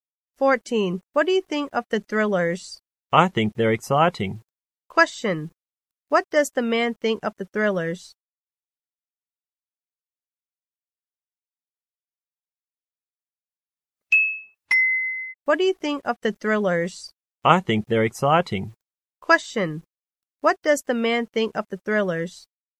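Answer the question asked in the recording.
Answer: Exciting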